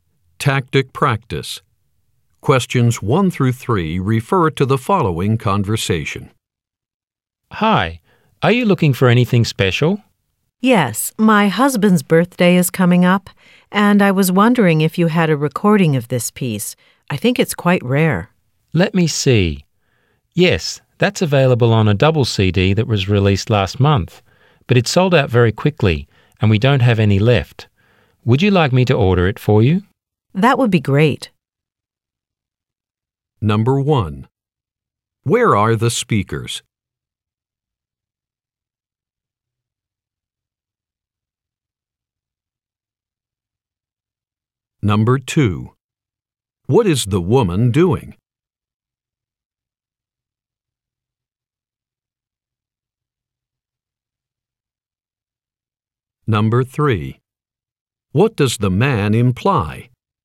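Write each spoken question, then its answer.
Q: Where are the speakers?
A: In a music store

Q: What is the woman doing?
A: Looking for a birthday present (a recording) for her husband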